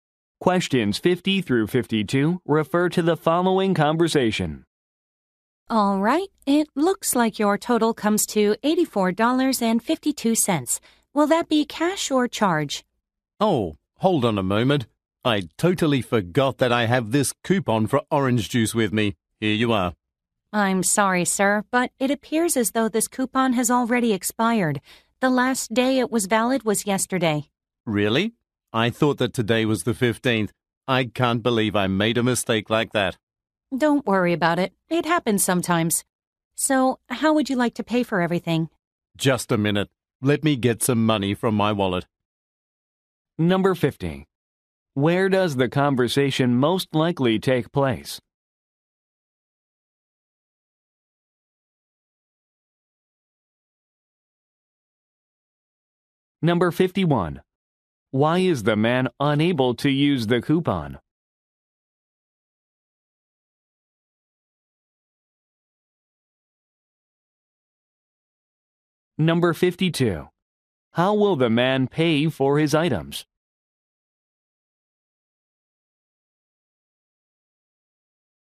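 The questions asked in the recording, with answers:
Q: Where does the conversation most likely take place?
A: At a grocery store

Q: Why is the man unable to use the coupon?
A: It has expired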